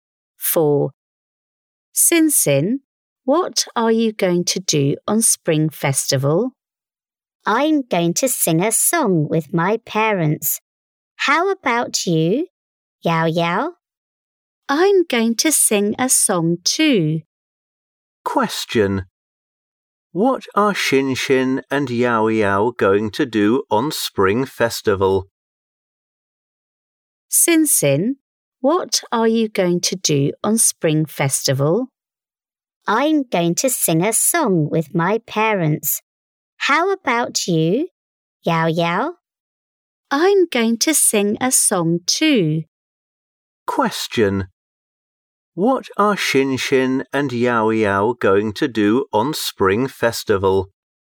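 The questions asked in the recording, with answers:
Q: What are Xin Xin and Yao Yao going to do on Spring Festival?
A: Sing a song.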